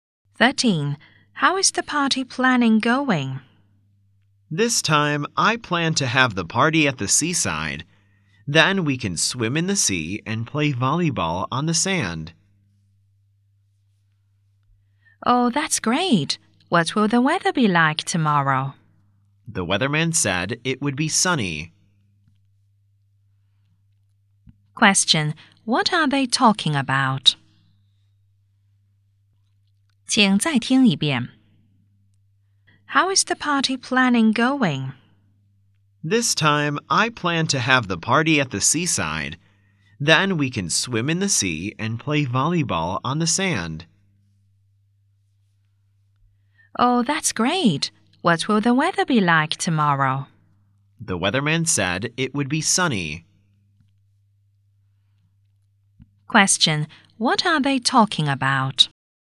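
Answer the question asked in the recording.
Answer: Planning a party at the seaside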